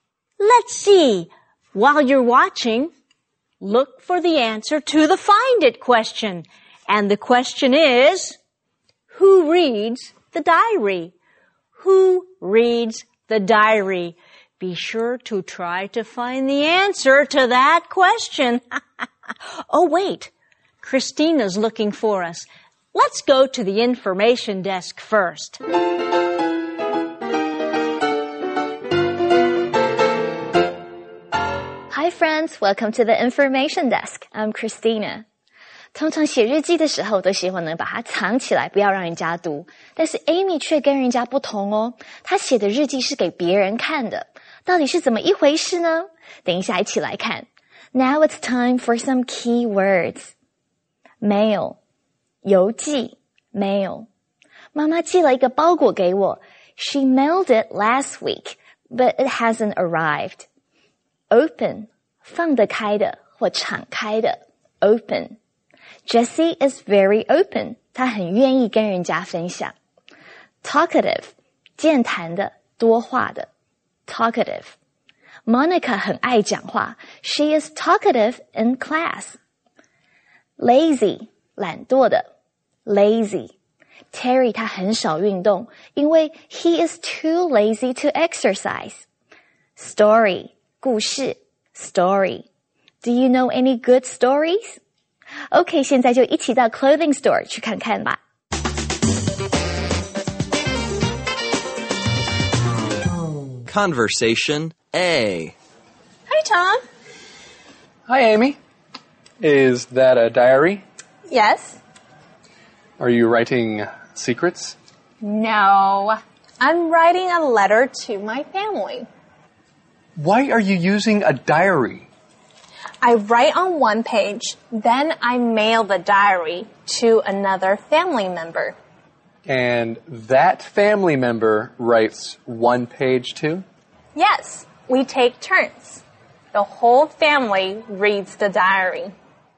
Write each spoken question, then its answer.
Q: who reads the diary?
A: Amy's whole family reads the diary.